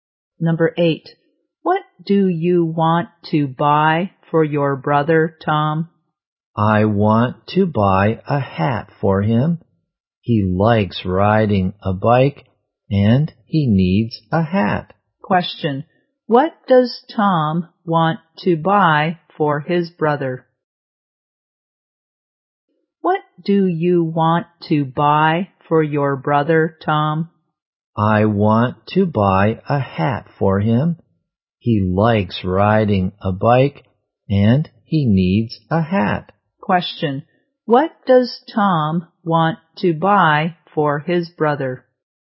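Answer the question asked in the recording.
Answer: A hat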